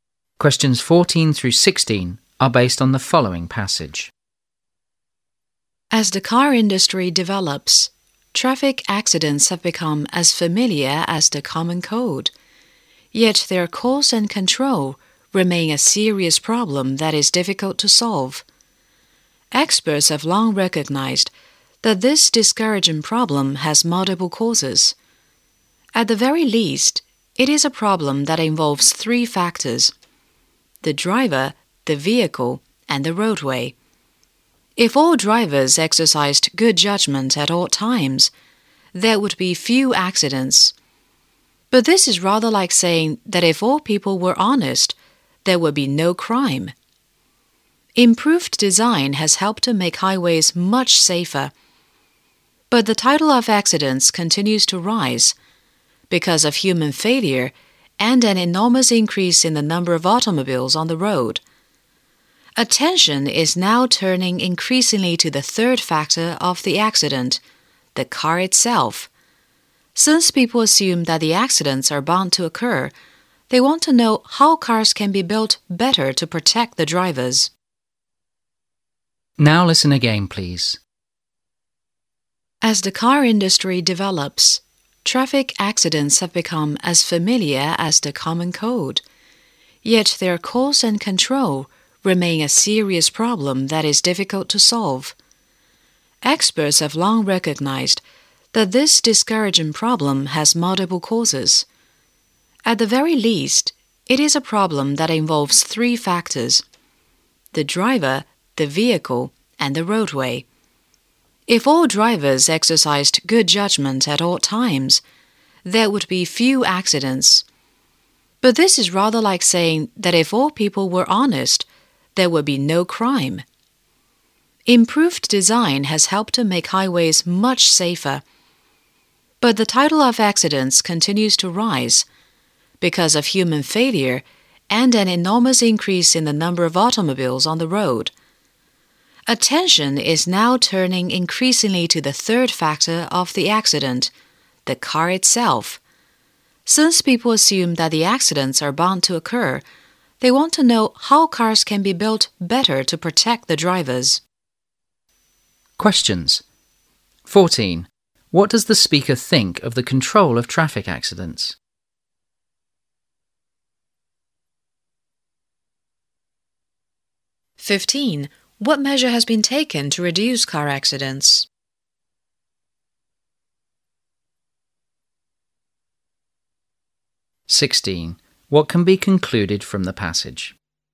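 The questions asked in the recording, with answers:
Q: What does the speaker think of the control of traffic accidents?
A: It is a serious problem that is difficult to solve

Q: What measure has been taken to reduce car accidents?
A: Improved highway design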